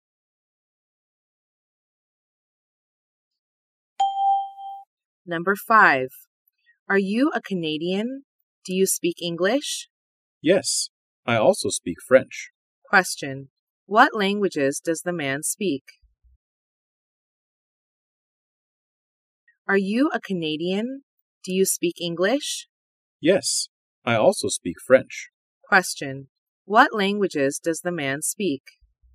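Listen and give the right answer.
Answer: English and French.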